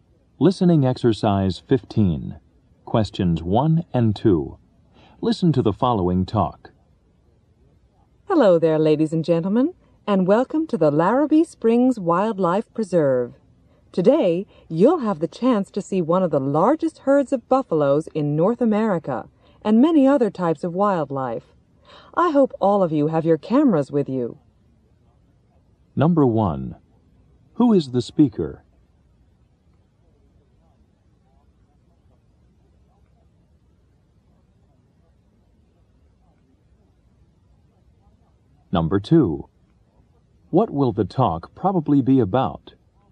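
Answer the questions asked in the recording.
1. A guide at a wildlife preserve
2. The wildlife, such as buffaloes, at the preserve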